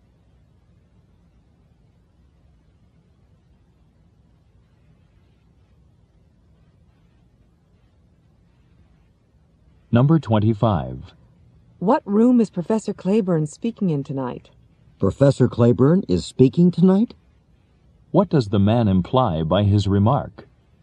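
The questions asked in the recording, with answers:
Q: What does the man imply by his remark?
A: He didn't know Professor Claiborne was speaking tonight.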